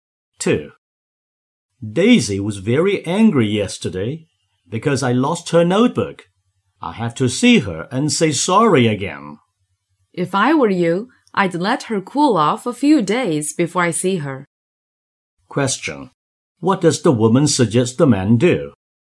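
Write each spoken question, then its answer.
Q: What does the woman suggest the man do?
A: Wait a few days for Daisy to cool off before seeing her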